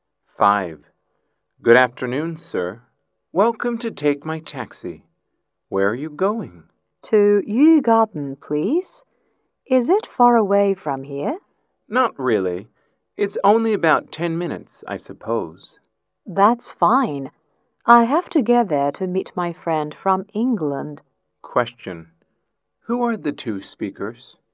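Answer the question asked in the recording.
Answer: A taxi driver and a passenger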